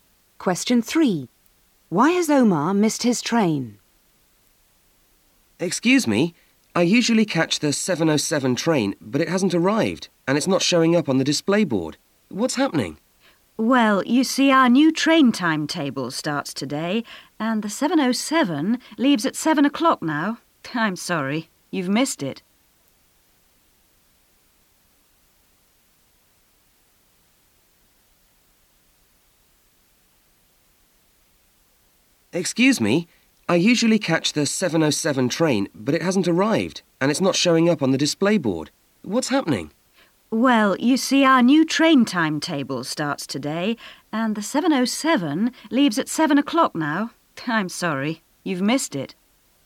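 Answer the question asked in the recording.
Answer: A new timetable started today; the train now leaves at 7 o'clock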